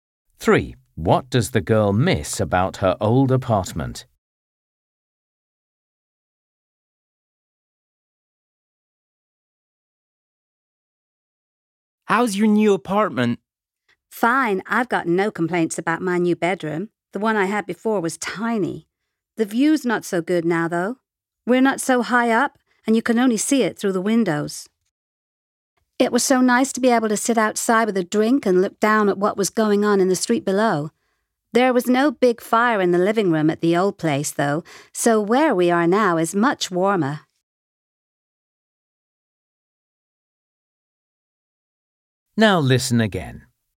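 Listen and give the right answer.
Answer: The balcony with a view of the street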